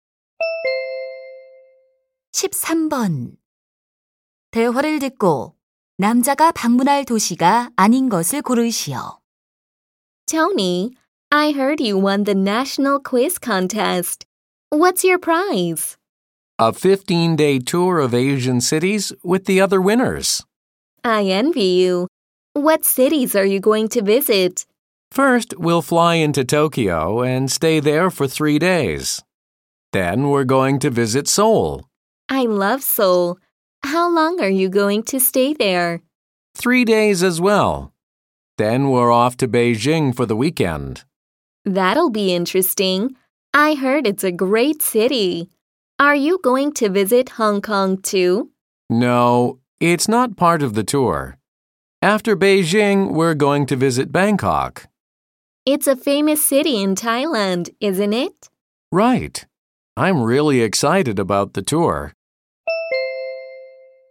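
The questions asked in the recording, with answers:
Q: 대화를 듣고 남자가 방문할 도시가 아닌 것을 고르시오.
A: 홍콩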